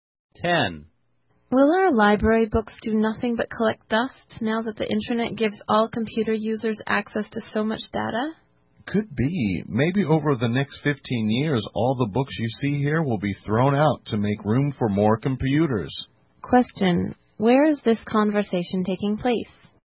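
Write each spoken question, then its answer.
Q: Where is this conversation taking place?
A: In a library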